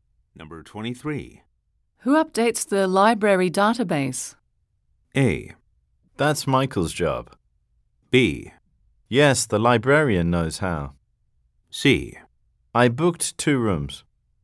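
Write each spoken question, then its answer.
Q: Who updates the library database?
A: A: That's Michael's job.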